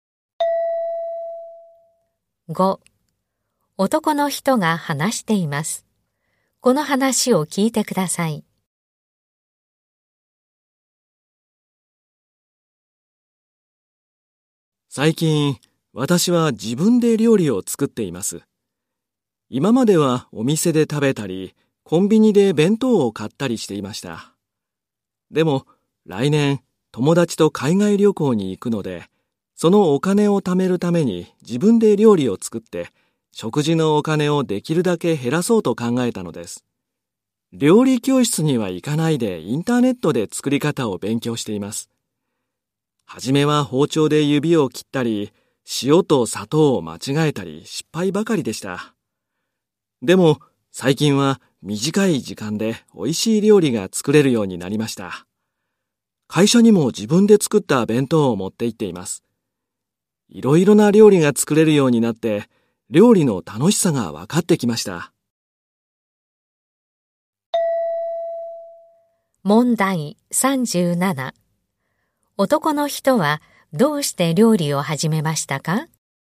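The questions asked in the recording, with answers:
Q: 男の人はどうして料理を始めましたか?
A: 海外旅行のお金を貯めるため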